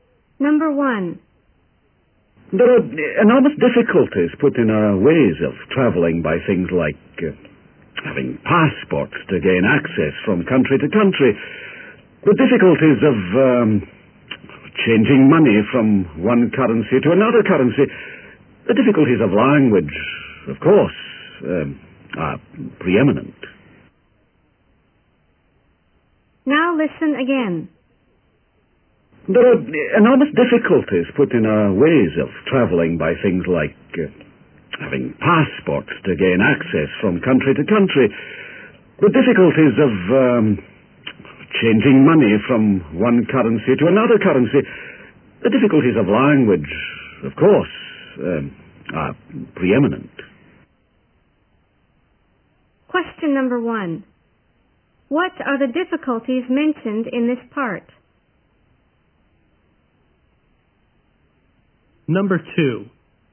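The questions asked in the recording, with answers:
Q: What are the difficulties mentioned in this part?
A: Passports, changing money, and language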